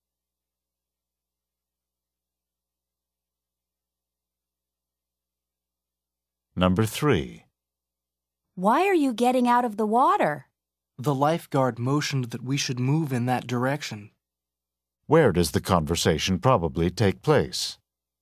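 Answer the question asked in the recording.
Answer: At a beach or swimming pool.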